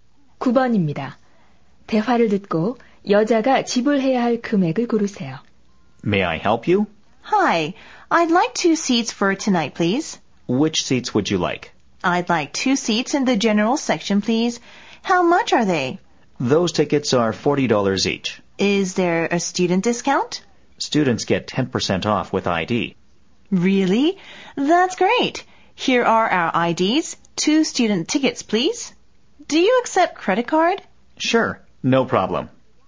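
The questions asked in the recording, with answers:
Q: 대화를 듣고 여자가 지불해야 할 금액을 고르세요.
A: 72달러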